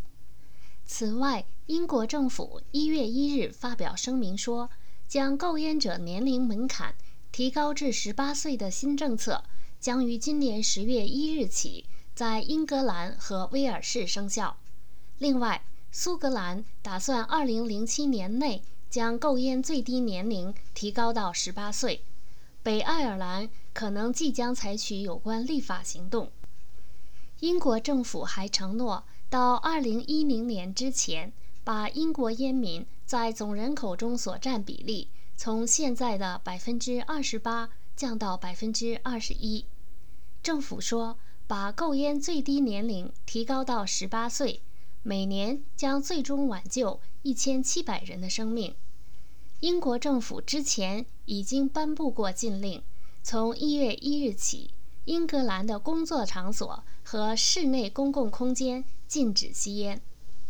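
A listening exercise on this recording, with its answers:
目前英国烟民在总人口中所占的比例是多少?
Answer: 28%

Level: 3rd Year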